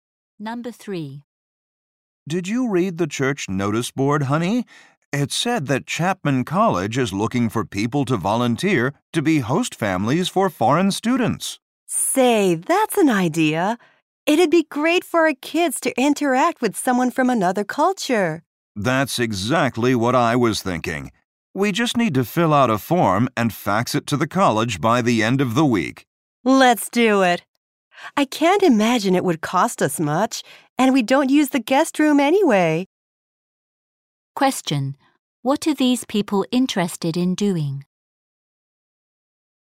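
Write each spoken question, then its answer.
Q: What are these people interested in doing?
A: Hosting a foreign student as a host family.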